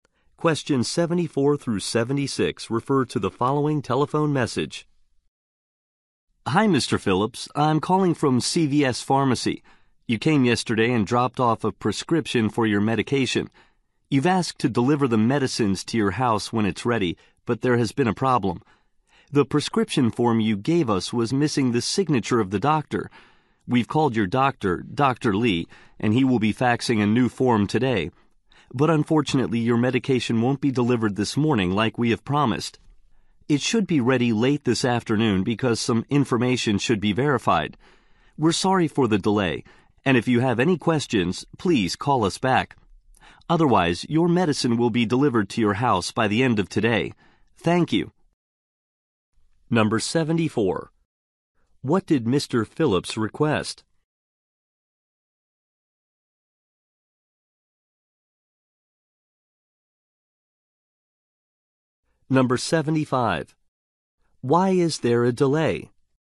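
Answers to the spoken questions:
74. Home delivery of his medicine
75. The prescription was missing the doctor's signature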